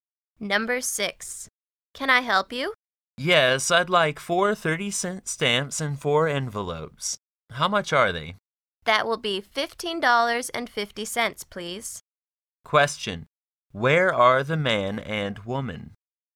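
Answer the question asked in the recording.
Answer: At a post office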